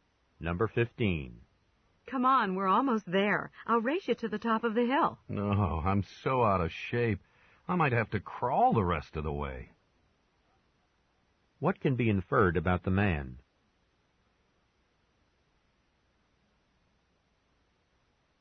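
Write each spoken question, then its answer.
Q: What can be inferred about the man?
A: He is tired and out of shape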